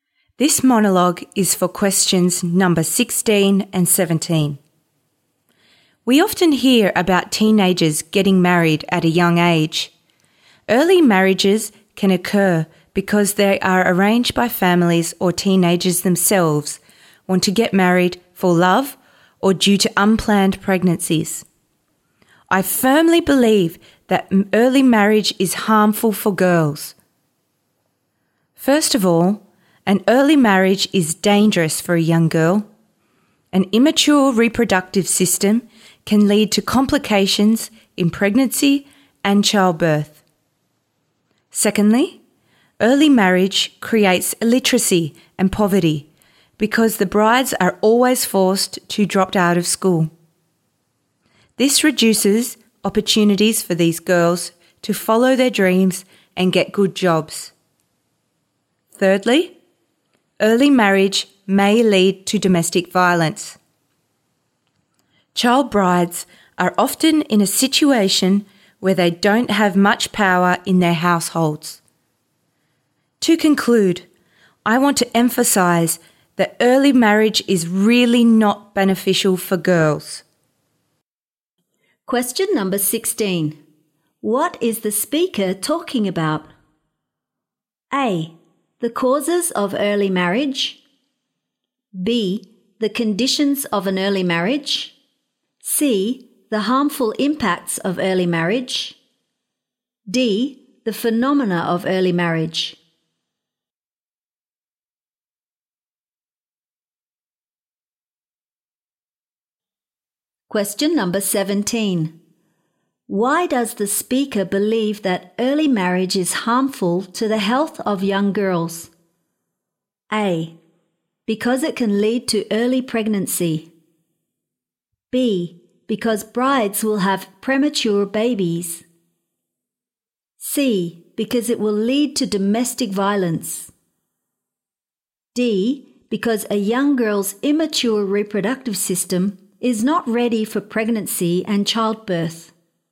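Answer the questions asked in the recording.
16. C: The harmful impacts of early marriage.
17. D: Because a young girl's immature reproductive system is not ready for pregnancy and childbirth.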